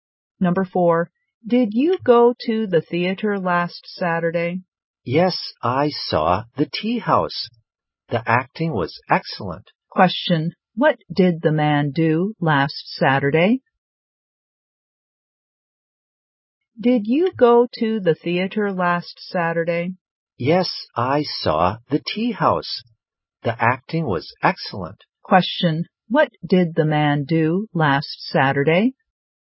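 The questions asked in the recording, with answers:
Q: Question, what did the man do last Saturday?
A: He went to the theater and saw The Tea House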